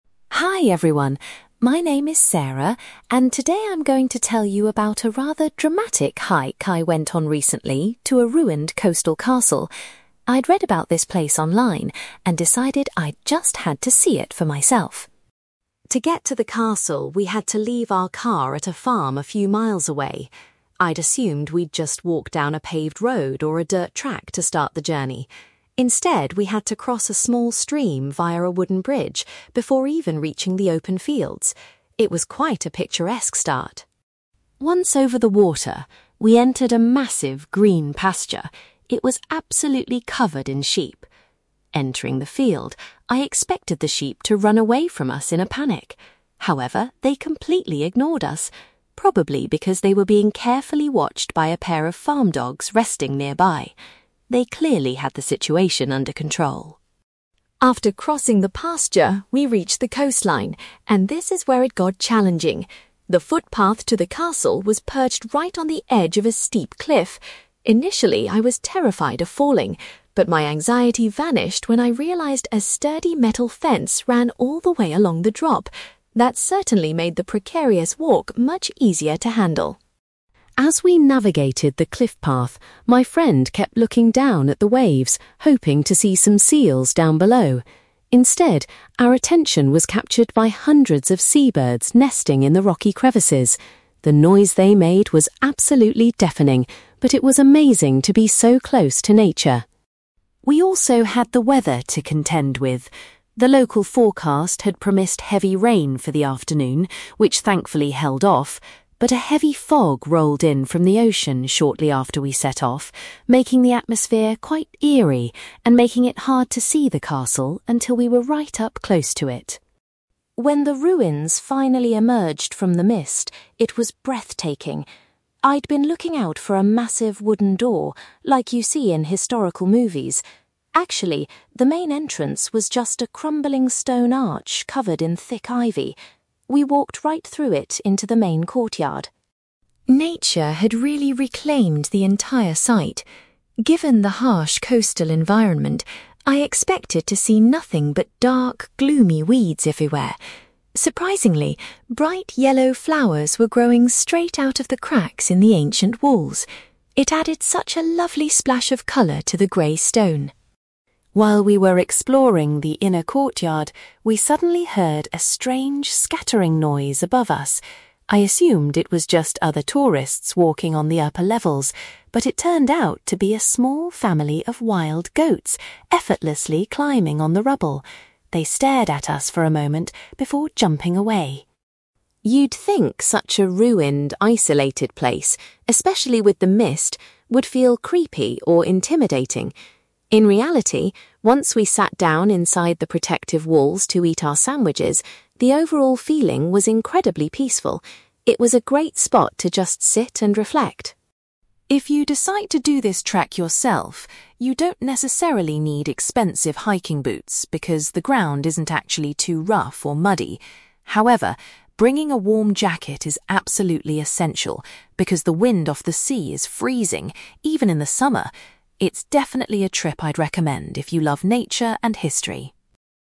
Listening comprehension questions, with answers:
You will hear a girl called Sarah giving a presentation to her university hiking club about a recent trip to a ruined castle. For questions 9-18, complete the sentences with a word or short phrase.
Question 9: Sarah was surprised that the start of the trek involved crossing a (9)........................... to reach the fields.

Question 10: Sarah realized that the sheep were kept in line by some (10)........................... in the pasture.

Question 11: Sarah felt much safer on the cliff path because of a (11)........................... that was installed there.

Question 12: Rather than marine mammals, Sarah was amazed to observe numerous (12)........................... on the cliff face.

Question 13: The walkers had to deal with (13)........................... during their journey, though they avoided the rain.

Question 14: Sarah notes that the primary entrance to the castle was a (14)........................... .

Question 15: Sarah was struck by the sight of some (15)........................... blooming on the ancient walls.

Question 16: Inside the castle grounds, Sarah was startled to discover some (16)........................... among the ruins.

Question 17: Sarah describes the atmosphere inside the castle ruins as being remarkably (17)........................... .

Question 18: Sarah highly recommends that anyone doing the walk should pack a (18)........................... .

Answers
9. wooden bridge
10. farm dogs
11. metal fence
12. sea birds
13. heavy fog
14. stone arch
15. yellow flowers
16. wild goats
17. peaceful
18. warm jacket

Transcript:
Sarah: Hi everyone. My name is Sarah, and today I'm going to tell you about a rather dramatic hike I went on recently to a ruined coastal castle. I'd read about this place online and decided I just had to see it for myself.
To get to the castle, we had to leave our car at a farm a few miles away. I'd assumed we'd just walk down a paved road or a dirt track to start the journey. Instead, we had to cross a small stream via a wooden bridge before even reaching the open fields. It was quite a picturesque start!
Once over the water, we entered a massive, green pasture. It was absolutely covered in sheep. Entering the field, I expected the sheep to run away from us in a panic. However, they completely ignored us, probably because they were being carefully watched by a pair of farm dogs resting nearby. They clearly had the situation under control.
After crossing the pasture, we reached the coastline, and this is where it got challenging. The footpath to the castle was perched right on the edge of a steep cliff. Initially, I was terrified of falling. But my anxiety vanished when I realised a sturdy metal fence ran all the way along the drop. That certainly made the precarious walk much easier to handle.
As we navigated the cliff path, my friend kept looking down at the waves, hoping to see some seals down below. Instead, our attention was captured by hundreds of sea birds nesting in the rocky crevices. The noise they made was absolutely deafening, but it was amazing to be so close to nature.
We also had the weather to contend with. The local forecast had promised heavy rain for the afternoon, which thankfully held off. But a heavy fog rolled in from the ocean shortly after we set off, making the atmosphere quite eerie and making it hard to see the castle until we were right up close to it.
When the ruins finally emerged from the mist, it was breathtaking. I'd been looking out for a massive wooden door, like you see in historical movies. Actually, the main entrance was just a crumbling stone arch covered in thick ivy. We walked right through it into the main courtyard.
Nature had really reclaimed the entire site. Given the harsh coastal environment, I expected to see nothing but dark, gloomy weeds everywhere. Surprisingly, bright yellow flowers were growing straight out of the cracks in the ancient walls. It added such a lovely splash of colour to the grey stone.
While we were exploring the inner courtyard, we suddenly heard a strange scattering noise above us. I assumed it was just other tourists walking on the upper levels. But it turned out to be a small family of wild goats effortlessly climbing on the rubble! They stared at us for a moment before jumping away.
You'd think such a ruined, isolated place, especially with the mist, would feel creepy or intimidating. In reality, once we sat down inside the protective walls to eat our sandwiches, the overall feeling was incredibly peaceful. It was a great spot to just sit and reflect.
If you decide to do this trek yourself, you don't necessarily need expensive hiking boots because the ground isn't actually too rough or muddy. However, bringing a warm jacket is absolutely essential because the wind off the sea is freezing, even in the summer! It's definitely a trip I'd recommend if you love nature and history.

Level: B2